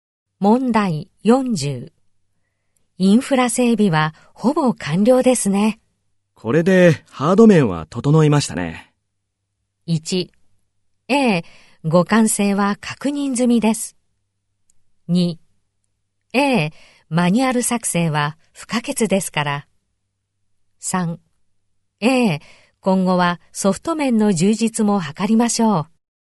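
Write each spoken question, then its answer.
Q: インフラ整備はほぼ完了ですね。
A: 3: A、今後はソフト面の充実も図りましょう。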